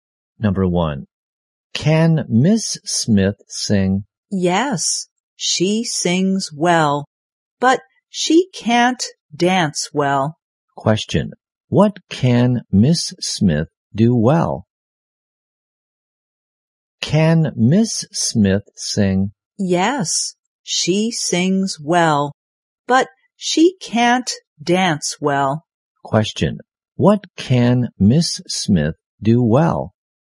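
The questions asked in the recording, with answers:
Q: what can Miss Smith do well?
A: Sing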